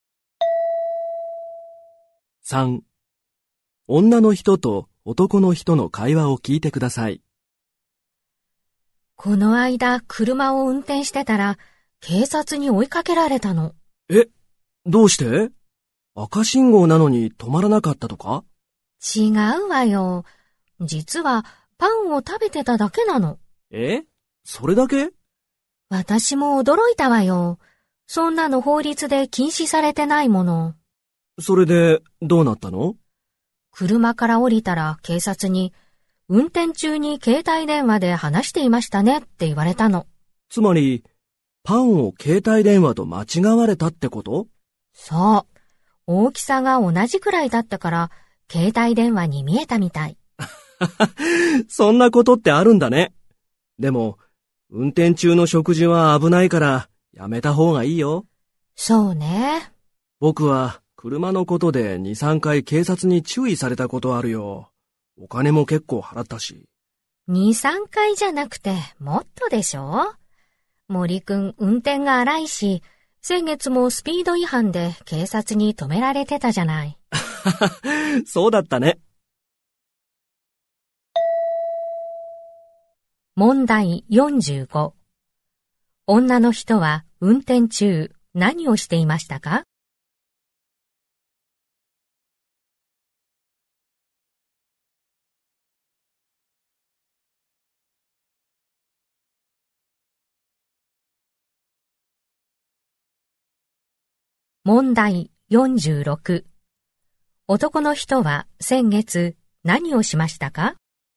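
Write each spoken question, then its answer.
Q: 女の人は運転中何をしていましたか?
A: パンを食べていた

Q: 男の人は先月何をしましたか?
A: スピード違反で警察に止められた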